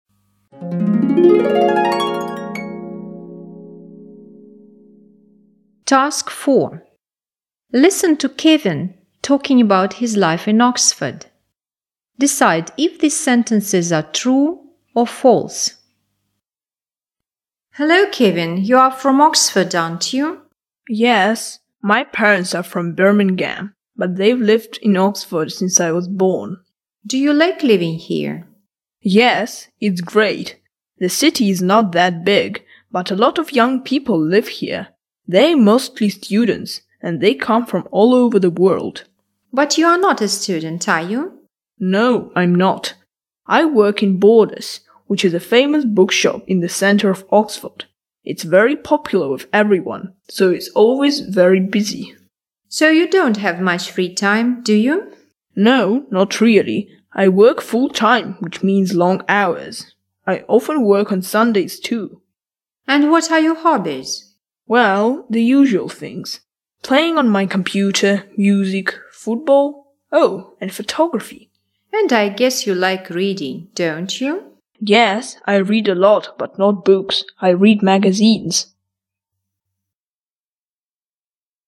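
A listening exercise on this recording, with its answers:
Task 4. Listen to Kevin talking about his life in Oxford. Decide if these sentences are true (T) or false (F).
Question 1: Kevin is from Oxford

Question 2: Kevin's parents don't live in Oxford.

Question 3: Students from different countries come to Oxford.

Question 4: Kevin goes to university.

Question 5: Borders is a popular bookshop.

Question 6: Kevin hasn't got much free time during the week.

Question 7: He's always free on Sundays.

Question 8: One of his hobbies is taking pictures.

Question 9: He reads a lot of books.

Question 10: Oxford is not a big city.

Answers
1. T
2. F
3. T
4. F
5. T
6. T
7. F
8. T
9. F
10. T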